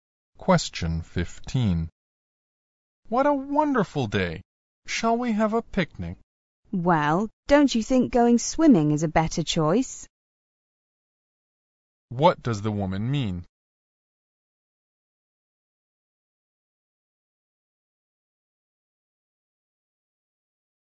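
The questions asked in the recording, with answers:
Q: What does the woman mean?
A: She would rather go swimming.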